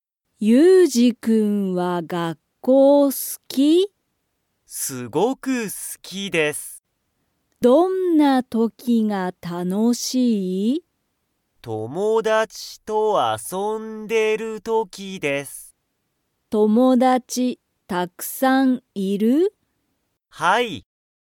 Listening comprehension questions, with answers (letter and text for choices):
ゆうじは、____時(とき)、楽(たの)しい。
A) 勉強(べんきょう)してる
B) 友達(ともだち)と遊(あそ)んでる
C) 先生(せんせい)と話(はな)してる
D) 音楽(おんがく)を聴(き)いてる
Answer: B) 友達(ともだち)と遊(あそ)んでる

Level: Level 1